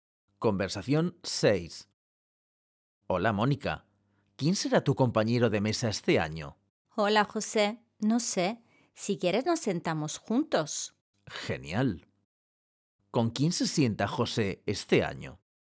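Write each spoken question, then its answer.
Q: ¿Con quién se sienta José este año?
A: con Mónica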